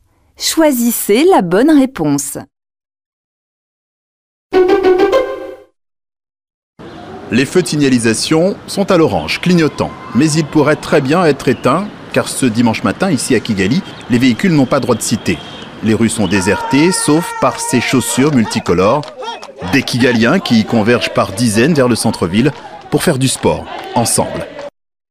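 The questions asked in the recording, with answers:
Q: Que se passe-t-il à Kigali ?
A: Le dimanche matin, les voitures sont interdites et les habitants se rassemblent au centre-ville pour faire du sport ensemble.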